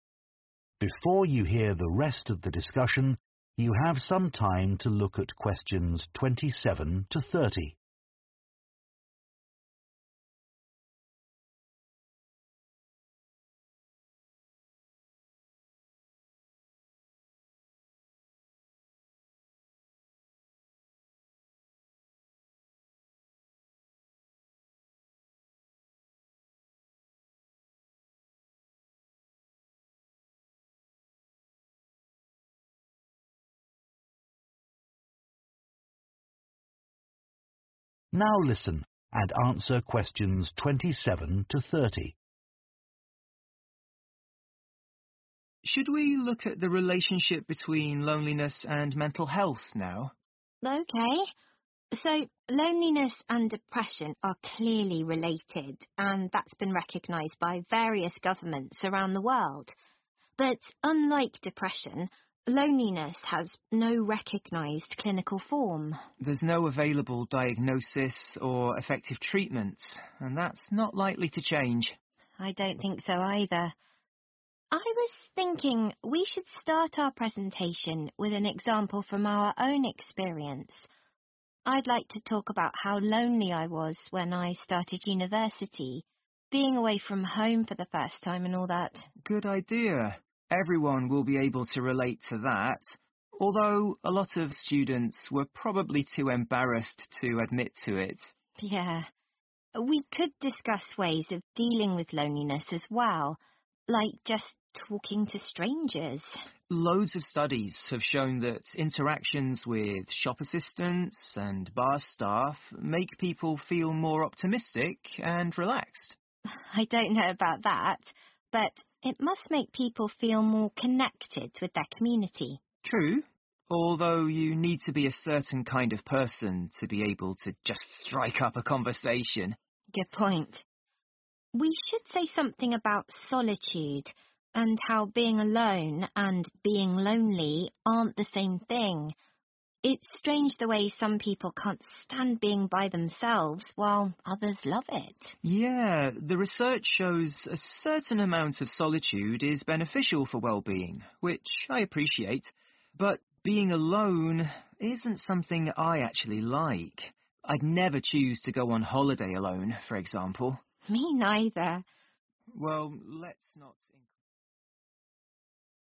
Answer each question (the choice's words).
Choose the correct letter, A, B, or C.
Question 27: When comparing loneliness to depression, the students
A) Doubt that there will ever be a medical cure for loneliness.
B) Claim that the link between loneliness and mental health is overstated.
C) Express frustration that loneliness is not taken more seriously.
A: Doubt that there will ever be a medical cure for loneliness.

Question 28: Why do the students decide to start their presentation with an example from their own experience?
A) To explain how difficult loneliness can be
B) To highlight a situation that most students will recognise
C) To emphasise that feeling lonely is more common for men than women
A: To highlight a situation that most students will recognise

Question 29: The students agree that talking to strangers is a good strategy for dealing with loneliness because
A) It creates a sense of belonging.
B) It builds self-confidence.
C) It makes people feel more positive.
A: It creates a sense of belonging.

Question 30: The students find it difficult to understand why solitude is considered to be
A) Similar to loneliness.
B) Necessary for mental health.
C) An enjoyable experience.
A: An enjoyable experience.

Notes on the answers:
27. The correct answer is A because Tamara mentions that, unlike depression, loneliness does not have a recognized clinical form, which suggests that there is no available diagnosis or effective treatment for loneliness. This indicates that they doubt a medical cure for loneliness will be found.
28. The correct answer is B because Tamara mentions that everyone will be able to relate to her personal experience of loneliness. This indicates that the example will be familiar to many students, making it easier for them to understand and connect with the topic of loneliness.
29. The correct answer is A because in the transcript, Tamara suggests that talking to strangers makes people feel more connected to their community. This connection helps create a sense of belonging, which can help reduce loneliness.
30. The correct answer is C because the conversation highlights that some individuals enjoy solitude, while others do not. This difference in feeling suggests that solitude is not always seen the same way by everyone, making it an enjoyable experience for some.

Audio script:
DEV But I don't think there is enough evidence to claim that there must be a group of neurons in our brains which influence social behaviour by making us feel bad when we're alone.
TAMARA There are a few studies which support the theory, but not conclusively enough. More evidence is needed.
DEV And anyway, this theory's not really useful when it comes to solving the problem of loneliness today.
DEV Should we look at the relationship between loneliness and mental health now?
So, loneliness and depression are clearly related and that's been recognised by various governments around the world. But unlike depression, loneliness has no recognised clinical form.
DEV There's no available diagnosis or effective treatment and that's not likely to change.
TAMARA I don't think so either I was thinking we should start our presentation with an example from our own experience. I like to talk about how lonely I was when I started university being away from home for the first time and all that
DEV Good idea. Everyone will be able to relate to that although a lot of students were probably too embarrassed to admit to it.
We could discuss ways of dealing with loneliness as well, like just talking to strangers.
DEV Loads of studies have shown that interactions with shop assistants and bar staff make people feel more optimistic and relaxed.
TAMARA I don't know about that, but it must make people feel more connected with their community.
DEV True, although you need to be a certain kind of person to be able to just strike up a conversation.
TAMARA Good point. We should say something about solitude and how being alone and being lonely aren't the same thing. It's strange the way some people can't stand being by themselves while others love it.
DEV Yeah, the research shows a certain amount of solitude is beneficial for wellbeing, which I appreciate, but being alone isn't something I actually like. I'd never choose to go on holiday alone, for example.
TAMARA Me neither.
DEV Well, let's not...